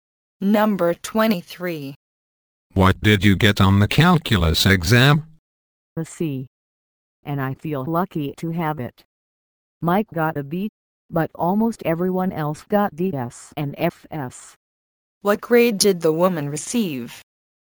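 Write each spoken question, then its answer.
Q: What grade did the woman receive?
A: A C.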